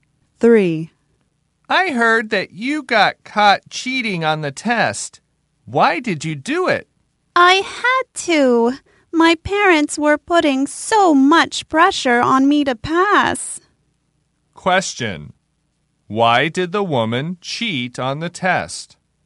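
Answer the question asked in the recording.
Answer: Her parents were putting a lot of pressure on her to pass.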